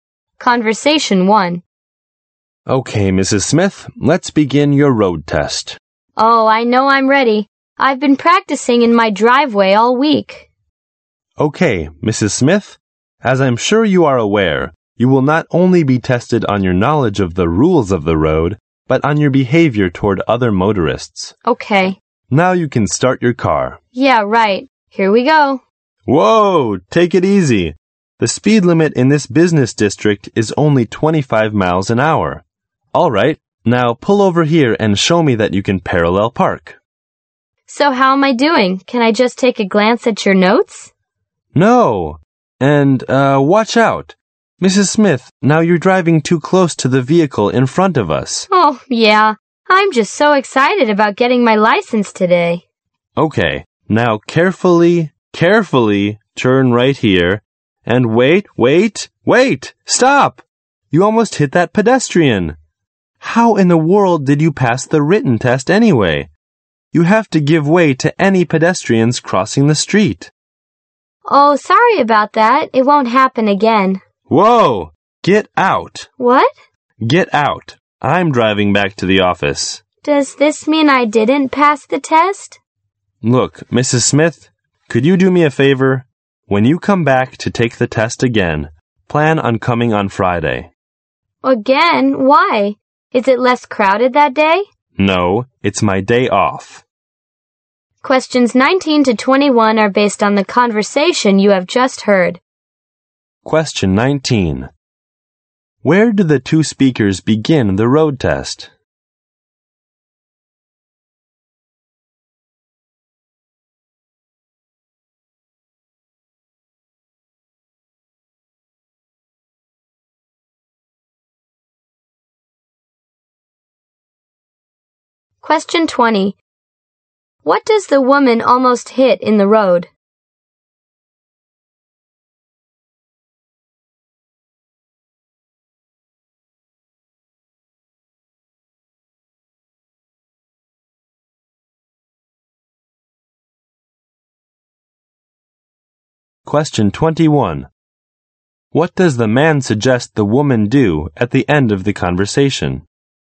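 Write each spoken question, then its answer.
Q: What does the woman almost hit in the road?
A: A pedestrian.

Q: What does the man suggest the woman do at the end of the conversation?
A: Come back on Friday to take the test again.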